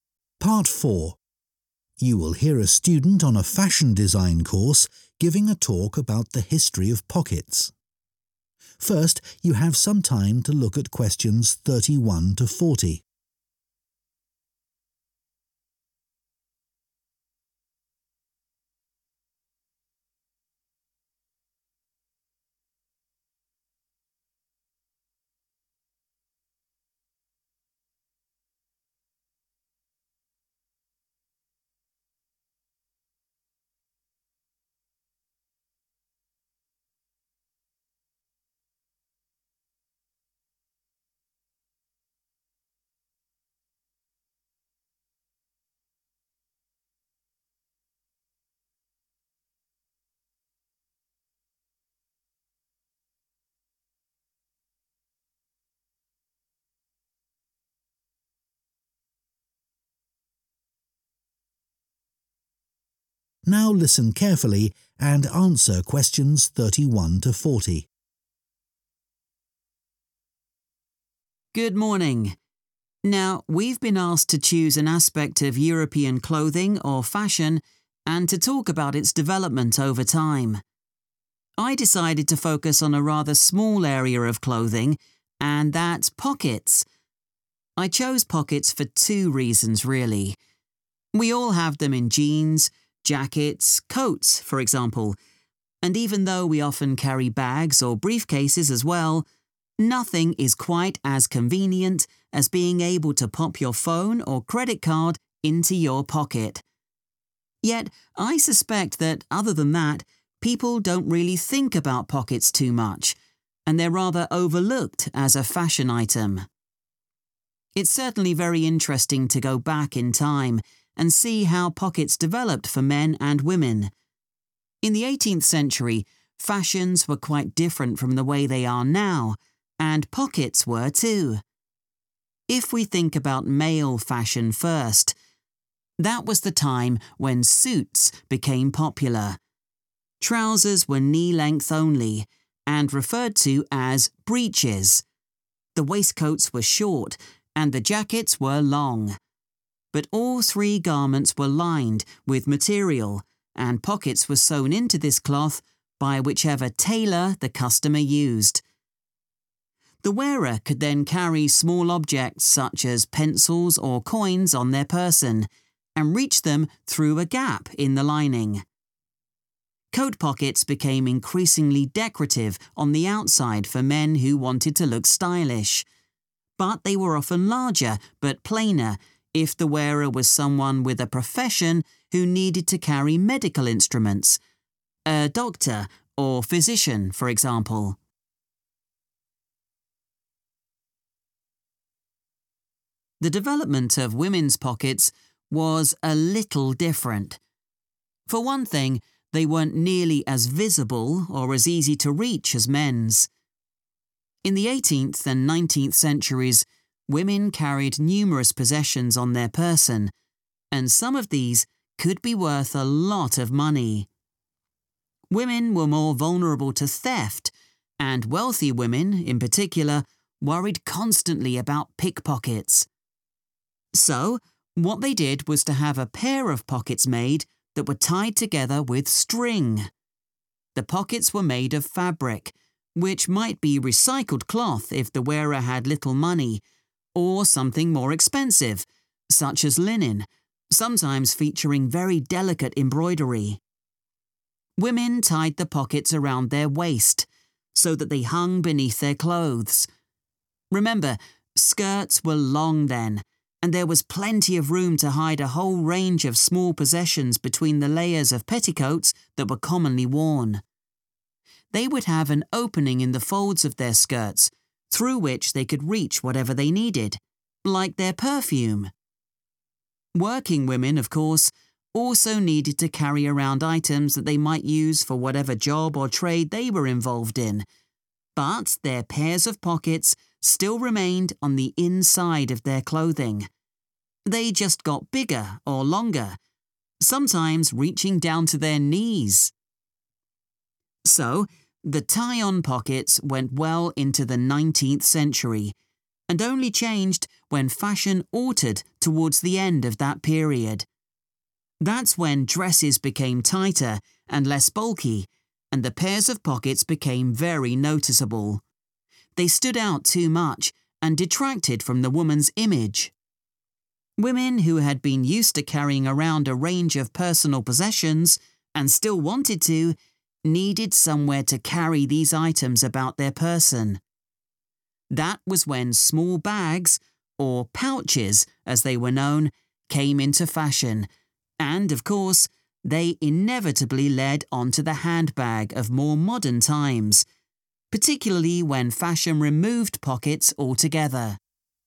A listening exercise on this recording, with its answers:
Complete the notes below. Write ONE WORD ONLY for each answer.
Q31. They are 31 but can be overlooked by consumers and designers.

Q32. Men started to wear 32 in the 18th century.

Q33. A 33 sewed pockets into the lining of the garments.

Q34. Bigger pockets might be made for men who belonged to a certain type of 34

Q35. Women's pockets were less 35 than men's.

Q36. Pockets were produced in pairs using 36 to link them together.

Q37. Pockets hung from the women's 37 under skirts and petticoats.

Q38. Items such as 38 could be reached through a gap in the material.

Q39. When dresses changed shape, hidden pockets had a negative effect on the 39 of women.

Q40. Bags called 'pouches' became popular, before women carried a 40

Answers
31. convenient
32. suits
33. tailor
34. profession
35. visible
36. string(s)
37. waist(s)
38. perfume
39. image
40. handbag